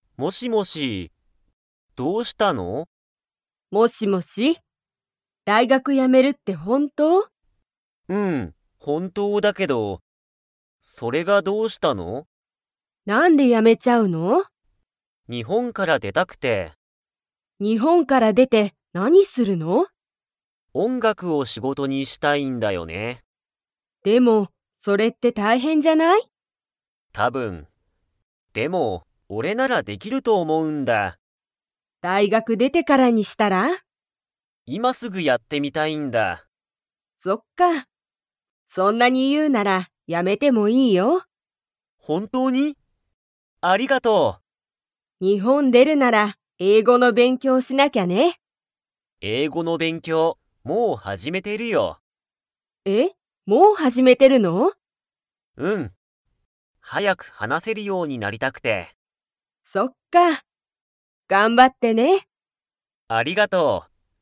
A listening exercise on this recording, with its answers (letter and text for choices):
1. タカシは、____を仕事(しごと)にしたい。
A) 大学(だいがく)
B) 音楽(おんがく)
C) 英語(えいご)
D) 勉強(べんきょう)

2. タカシは、英語(えいご)の勉強(べんきょう)をもう始(はじ)めましたか?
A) はい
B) いいえ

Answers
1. B) 音楽(おんがく)
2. A) はい

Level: Level 2